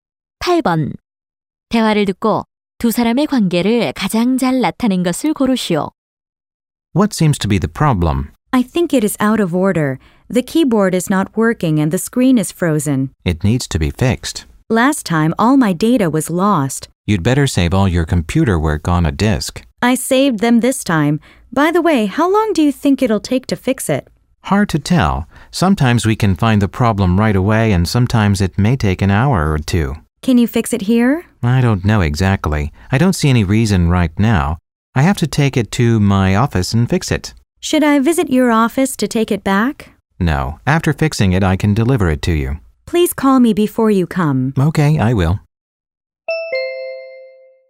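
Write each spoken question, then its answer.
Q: 대화를 듣고 두 사람의 관계를 가장 잘 나타낸 것을 고르시오.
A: 고객 - 컴퓨터 수리 기사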